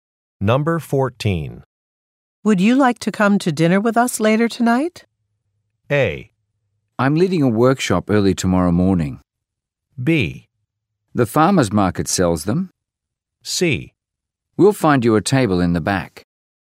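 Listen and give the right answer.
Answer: A: I'm leading a workshop early tomorrow morning.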